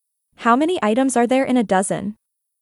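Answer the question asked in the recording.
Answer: twelve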